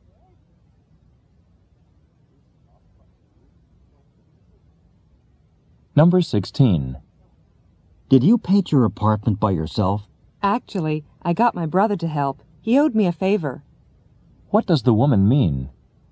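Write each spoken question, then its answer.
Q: What does the woman mean?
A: Her brother helped her paint because he owed her a favor.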